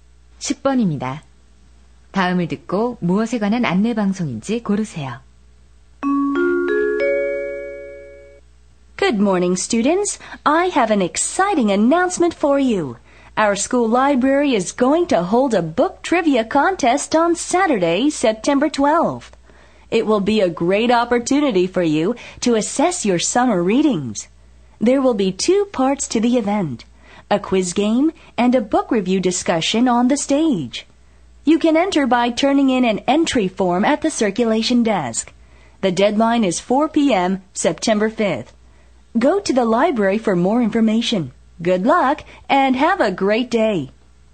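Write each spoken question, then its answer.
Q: 다음을 듣고 무엇에 관한 안내 방송인지 고르세요.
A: 도서관 독서 퀴즈 대회 안내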